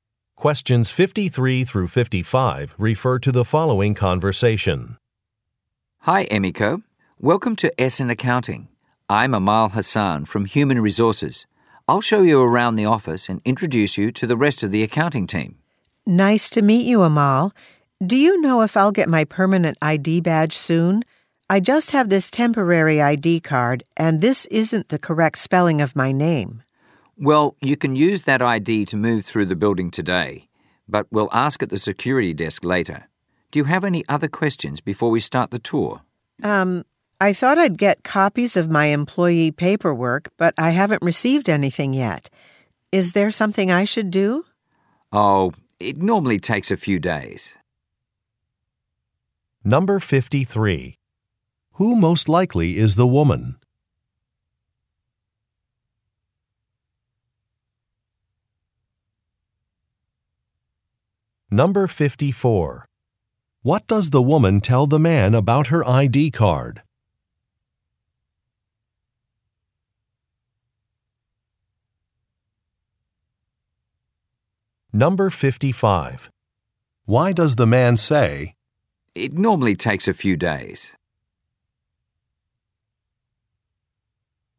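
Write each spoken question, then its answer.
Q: Who most likely is the woman?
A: A new employee

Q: What does the woman tell the man about her ID card?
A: Her name is spelled incorrectly on it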